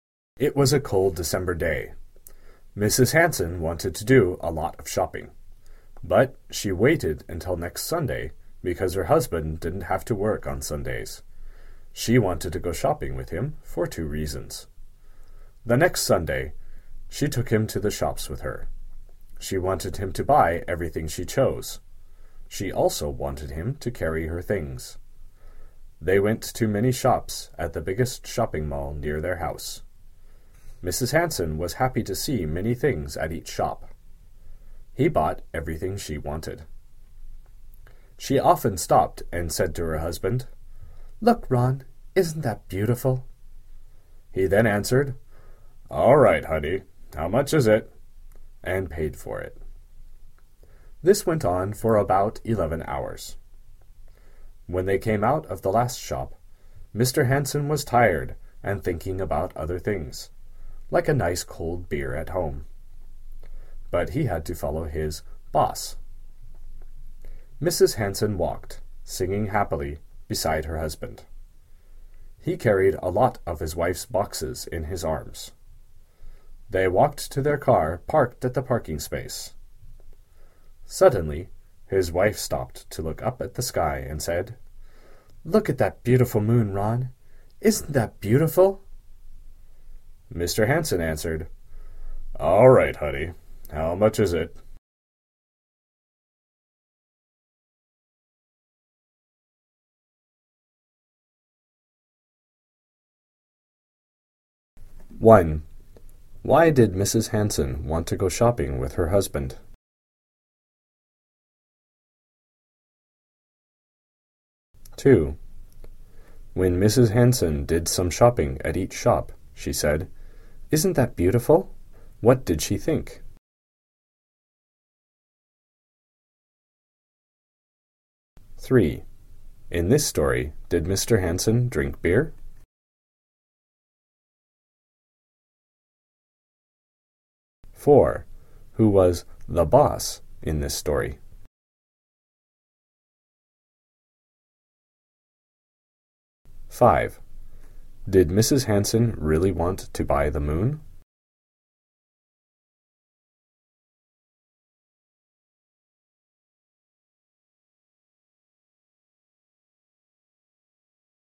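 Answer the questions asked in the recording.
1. She wanted him to buy everything she chose and to carry her things.
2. She wanted her husband to buy it for her.
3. No, he only thought about it.
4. Mrs. Hansen
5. No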